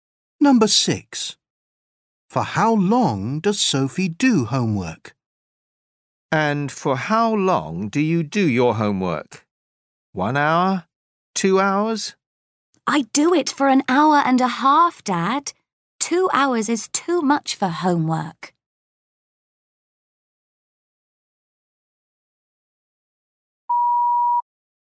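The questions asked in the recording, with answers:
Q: For how long does Sophie do homework?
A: 1.5 hours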